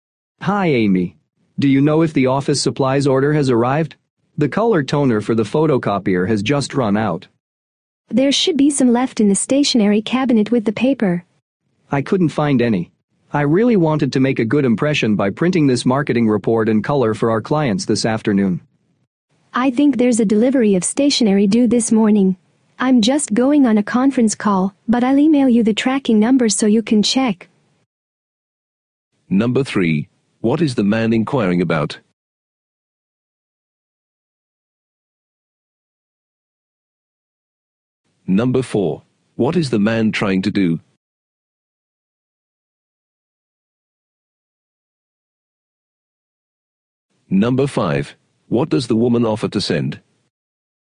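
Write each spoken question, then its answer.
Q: What is the man inquiring about?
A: Whether the office supplies order has arrived

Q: What is the man trying to do?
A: Print a marketing report in color for clients

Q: What does the woman offer to send?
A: The tracking number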